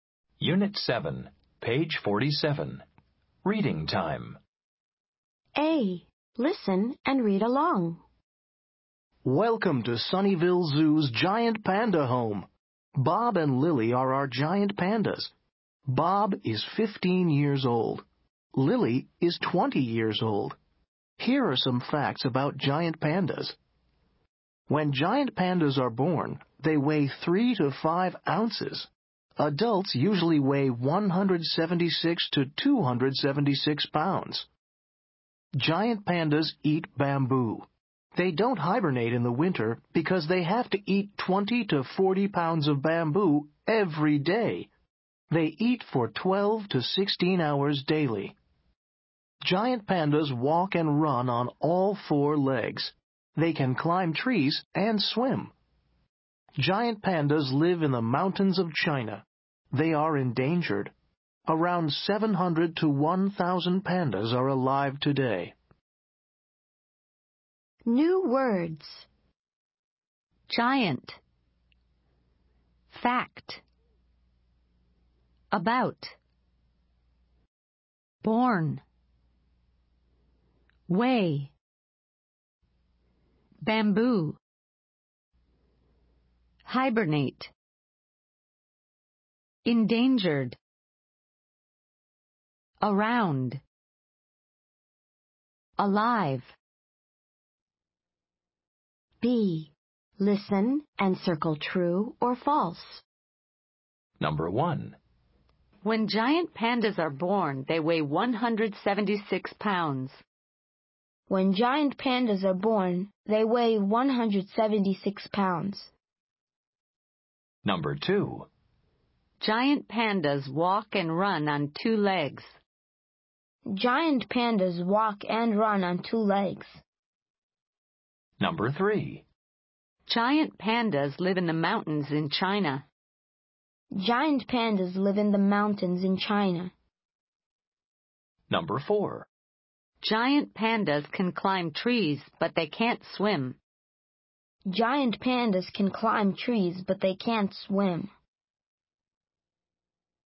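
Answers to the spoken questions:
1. False
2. False
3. True
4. False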